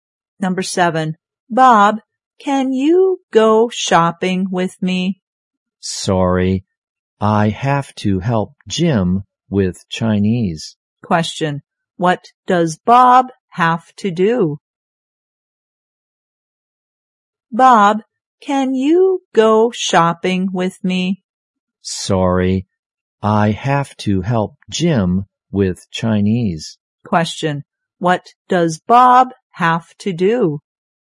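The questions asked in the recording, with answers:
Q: What does Bob have to do?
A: Help Jim with Chinese.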